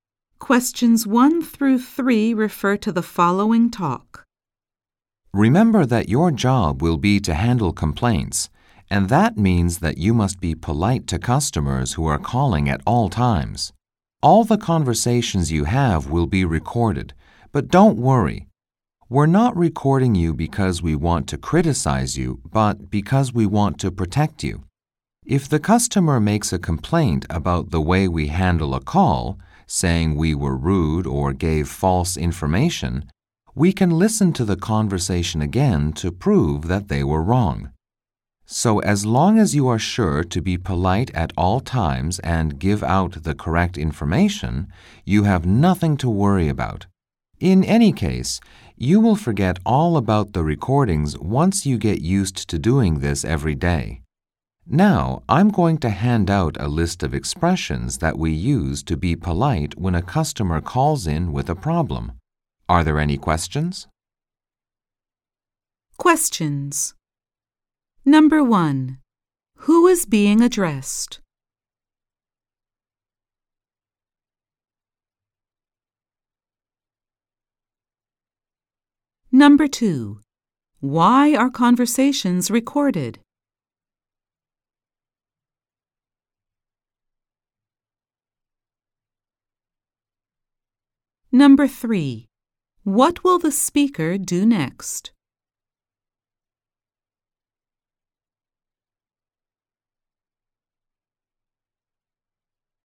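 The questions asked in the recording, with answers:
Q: Who is being addressed?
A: New customer service staff who will handle complaints

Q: Why are conversations recorded?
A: To protect employees if customers complain

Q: What will the speaker do next?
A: Hand out a list of polite expressions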